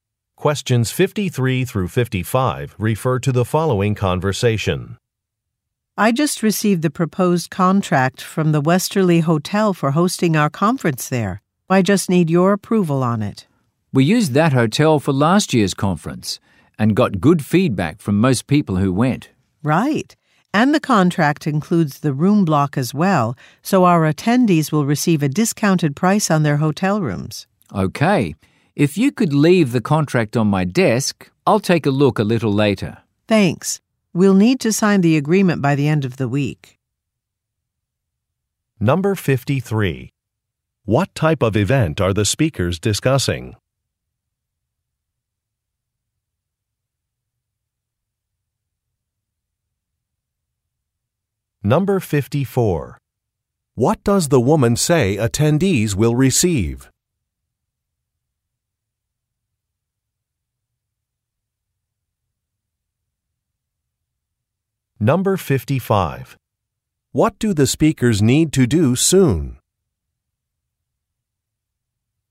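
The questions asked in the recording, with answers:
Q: What type of event are the speakers discussing?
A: A conference

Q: What does the woman say attendees will receive?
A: A discounted price on hotel rooms

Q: What do the speakers need to do soon?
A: Sign the contract by the end of the week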